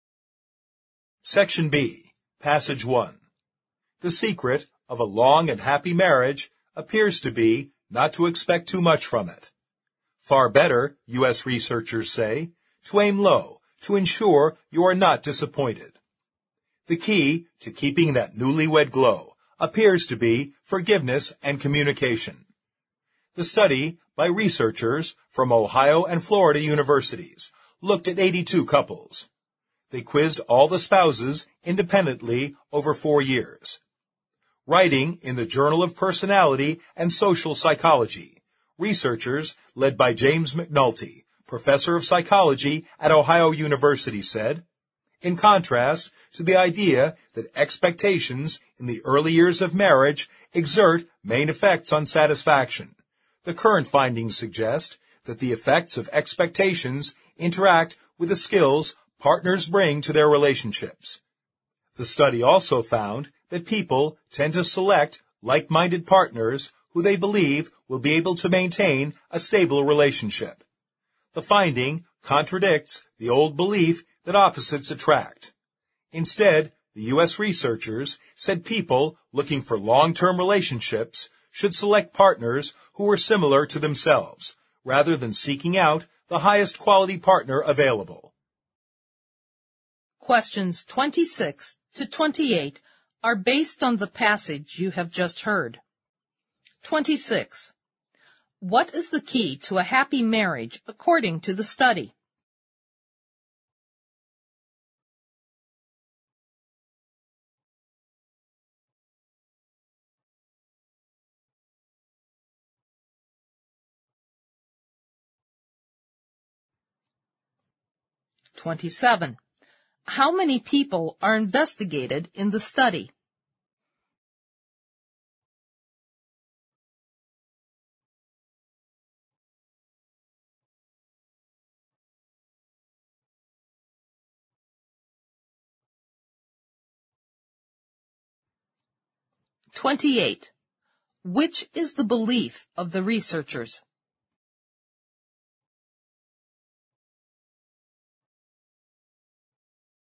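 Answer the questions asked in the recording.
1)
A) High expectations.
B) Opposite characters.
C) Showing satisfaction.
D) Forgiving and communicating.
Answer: D) Forgiving and communicating.
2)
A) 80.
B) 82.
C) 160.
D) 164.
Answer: D) 164.
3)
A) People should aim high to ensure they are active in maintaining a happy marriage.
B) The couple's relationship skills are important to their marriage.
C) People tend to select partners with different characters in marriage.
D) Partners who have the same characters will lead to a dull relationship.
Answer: B) The couple's relationship skills are important to their marriage.

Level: 四级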